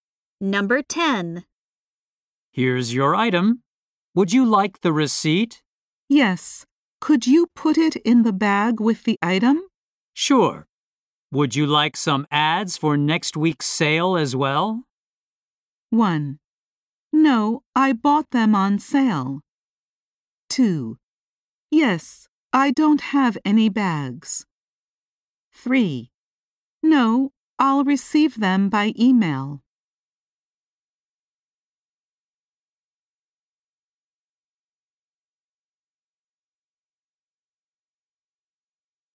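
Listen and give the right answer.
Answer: 3: No, I'll receive them by email.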